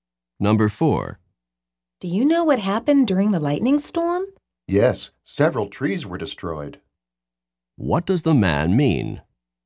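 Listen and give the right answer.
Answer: Several trees were destroyed in the storm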